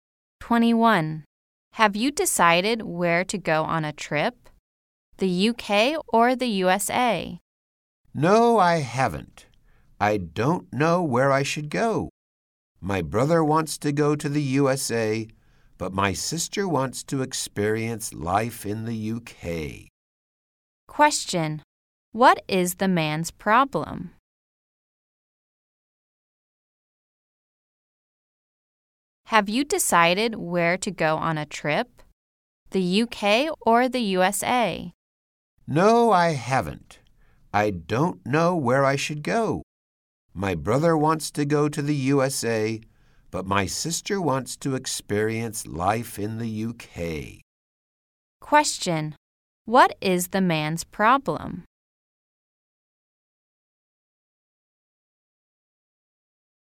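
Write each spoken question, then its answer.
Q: Question: What is the man's problem?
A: He can't decide whether to go to the UK or the USA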